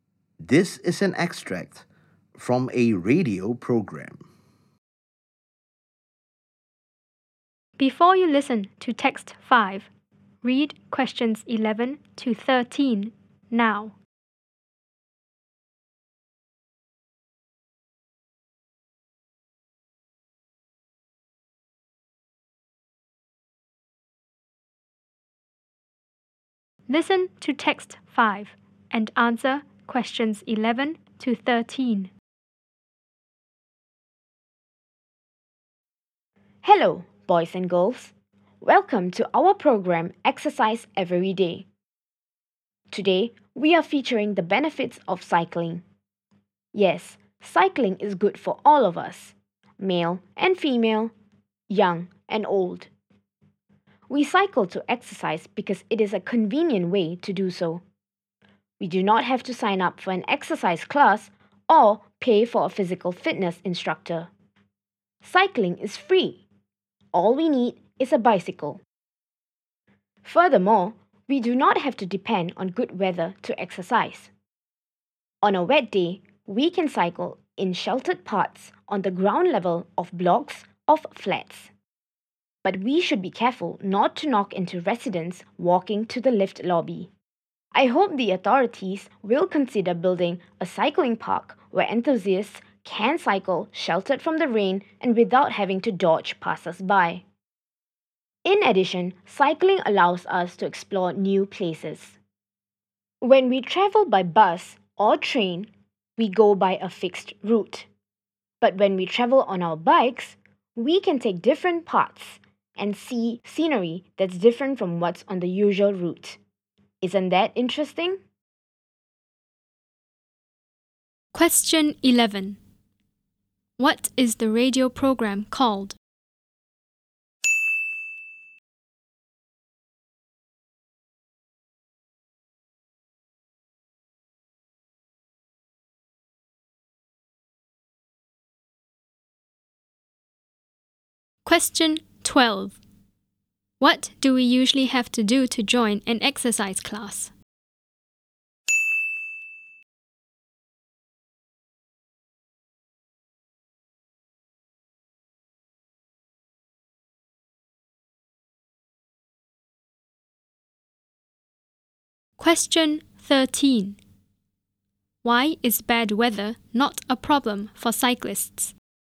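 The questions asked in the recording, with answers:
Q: What is the radio program called?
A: Exercise Every Day

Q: Why is bad weather not a problem for cyclists?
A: They can cycle in sheltered parts on the ground level of blocks of flats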